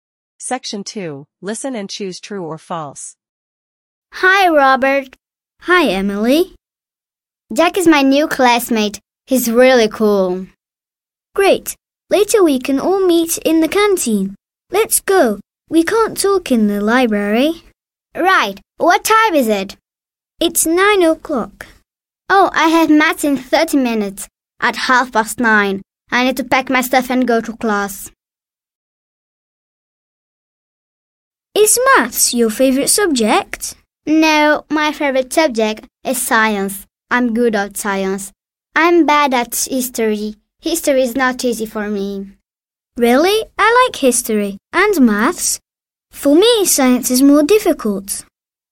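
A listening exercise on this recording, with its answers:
Listen and choose True or False.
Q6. Emily and Robert are in the library.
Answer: True

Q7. Emily and Robert can talk in the library.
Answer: False

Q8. "Half past nine" is 9: 45.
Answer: False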